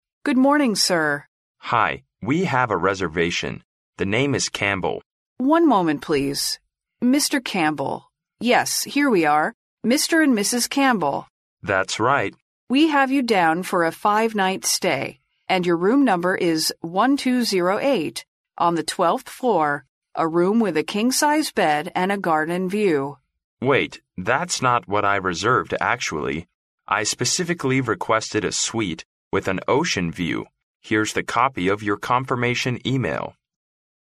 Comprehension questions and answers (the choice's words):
Which room did the couple book?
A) A room with a king-size bed.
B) A suite with a king-size bed.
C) A room with an ocean view.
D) A suite with an ocean view.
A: A suite with an ocean view.

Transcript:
W: Good morning, sir.
M: Hi. We have a reservation. The name is Campbell.
W: One moment, please. Mr. Campbell...Yes, here we are Mr. and Mrs. Campbell.
M: That's right.
W: We have you down for a five-night stay. And your room number is 1208, on the 12th floor, a room with a king-size bed, and a garden view...
M: Wait. That's not what I reserved actually. I specifically requested a suite with an ocean view. Here's the copy of your confirmation email...